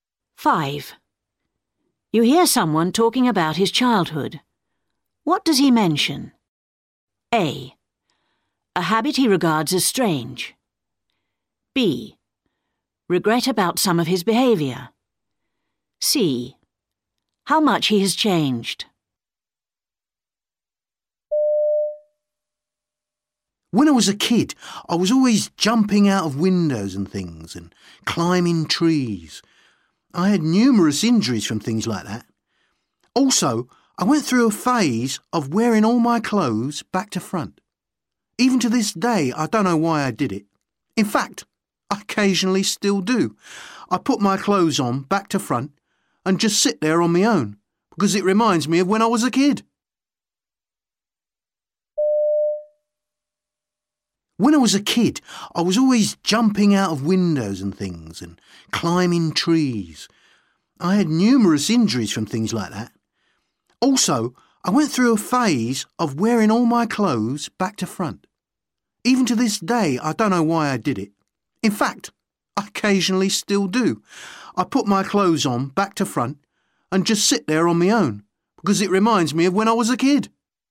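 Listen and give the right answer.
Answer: A: A habit he regards as strange.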